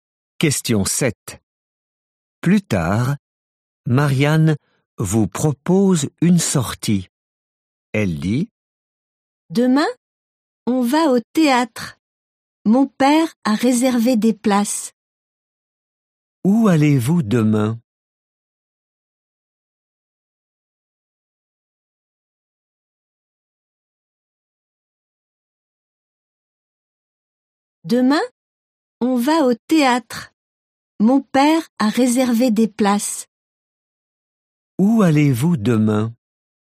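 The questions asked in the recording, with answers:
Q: Où allez-vous demain?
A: Au théâtre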